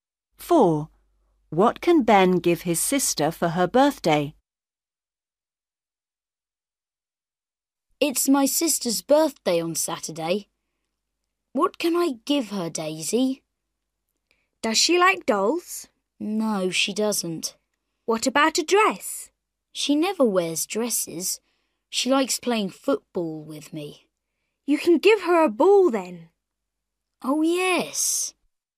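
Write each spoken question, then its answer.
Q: What can Ben give his sister for her birthday?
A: a ball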